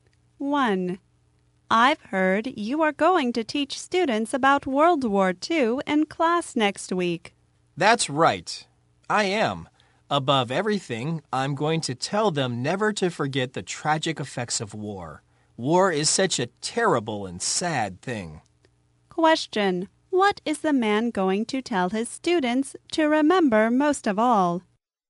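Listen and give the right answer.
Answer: Never to forget the tragic effects of war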